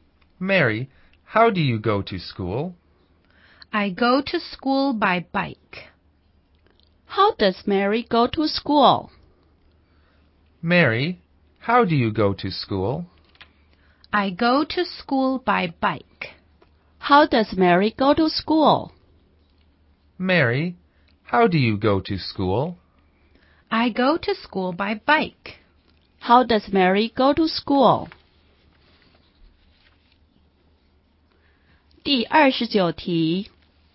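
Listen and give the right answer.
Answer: By bike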